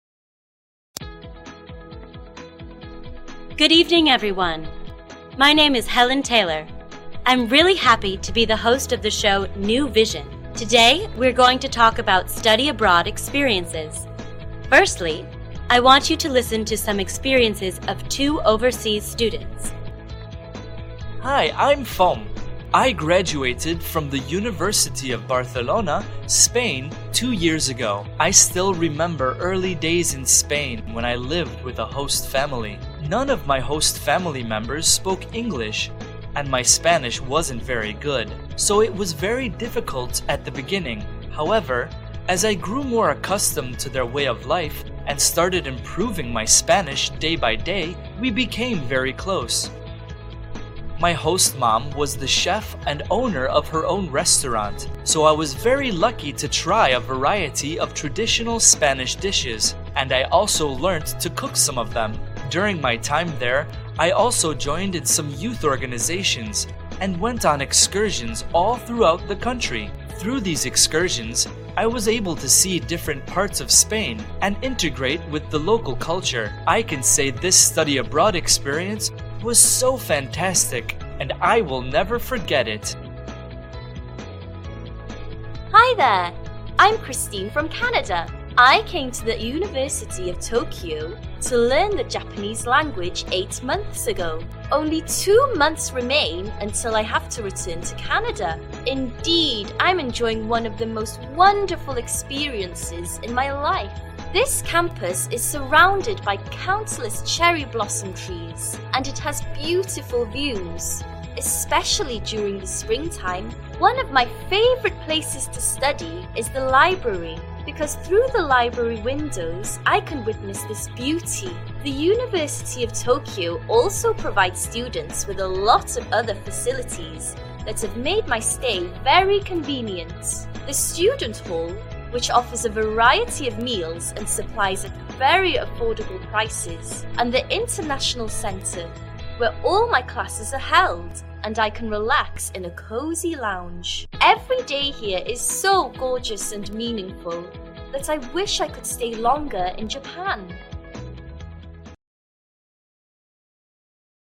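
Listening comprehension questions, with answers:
Task: Complete the sentences.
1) Fom stayed with a ___________ family in Spain.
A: host

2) His host mother owned a ___________.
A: restaurant

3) Christine studies at the University of ___________.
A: Tokyo

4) Her favorite place to study is the ___________.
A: library

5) Christine wishes she could stay ___________ in Japan.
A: longer

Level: lớp 11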